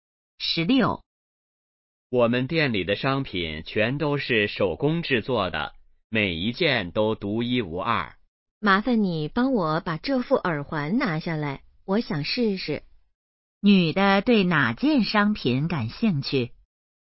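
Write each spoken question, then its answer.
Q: 女的对哪件商品感兴趣?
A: 耳环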